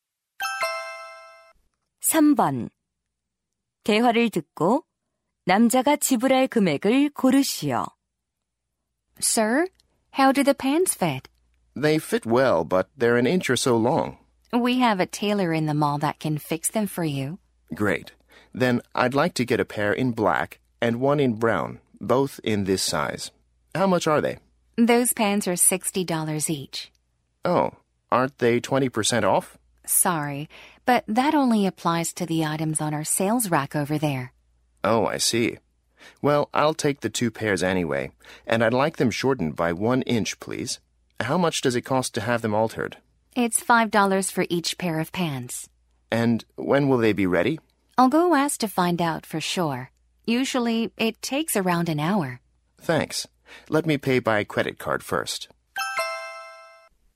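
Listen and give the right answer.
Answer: $130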